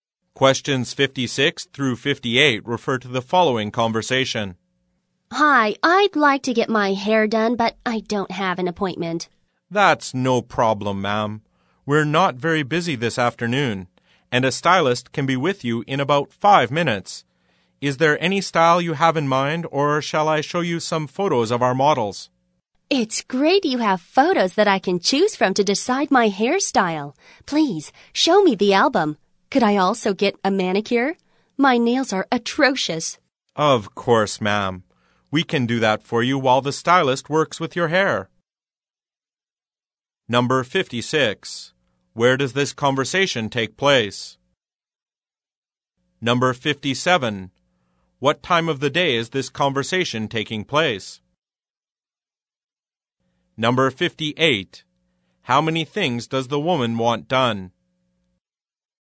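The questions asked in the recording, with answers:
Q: Where does this conversation take place?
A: At a hair salon

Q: What time of the day is this conversation taking place?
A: In the afternoon

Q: How many things does the woman want done?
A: Two (a hairstyle and a manicure)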